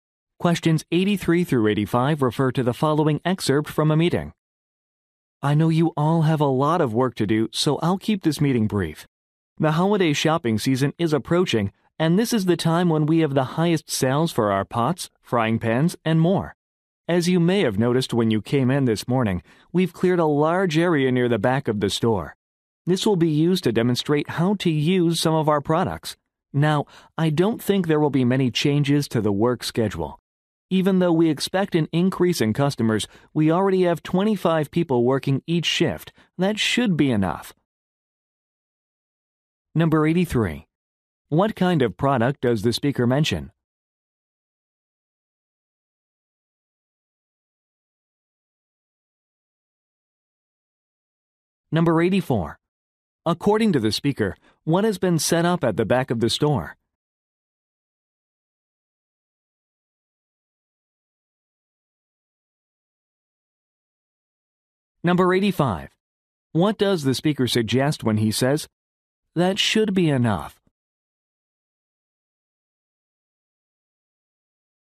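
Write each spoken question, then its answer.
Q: What kind of product does the speaker mention?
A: Kitchenware such as pots and frying pans

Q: According to the speaker, what has been set up at the back of the store?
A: An area for product demonstrations

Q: What does the speaker suggest when he says, "That should be enough"?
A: No extra staff are needed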